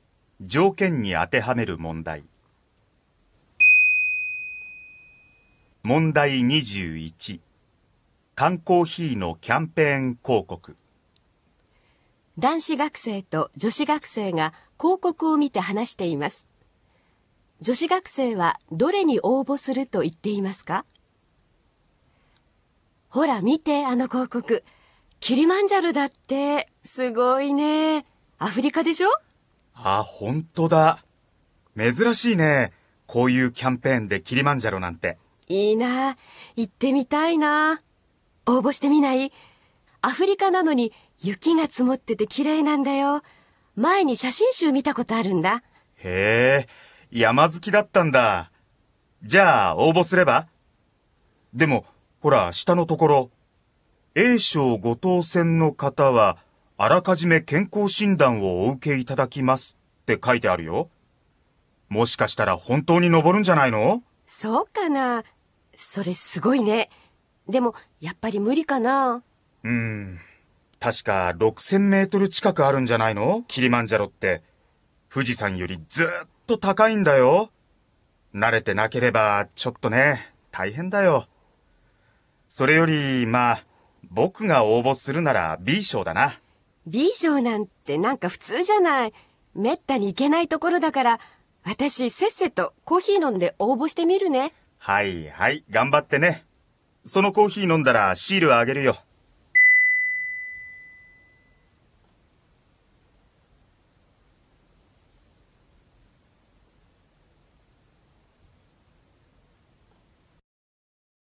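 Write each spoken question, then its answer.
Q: 女子学生はどれに応募すると言っていますか?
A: A賞(キリマンジャロ)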